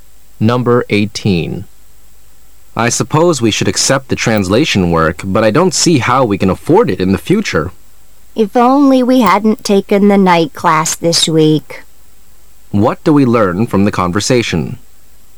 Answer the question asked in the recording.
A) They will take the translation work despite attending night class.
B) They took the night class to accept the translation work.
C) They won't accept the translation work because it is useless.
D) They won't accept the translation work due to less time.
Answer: D) They won't accept the translation work due to less time.

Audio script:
[解析] M:I suppose we should accept the translation work,but I don't see how we can afford it in the future. W:If only we hadn't taken the night class this week. Q:What do we learn from the conversation?